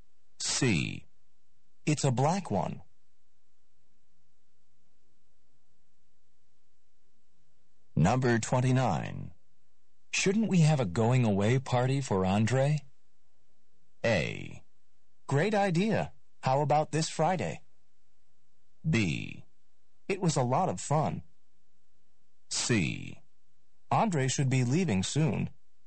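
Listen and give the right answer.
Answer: A: Great idea. How about this Friday?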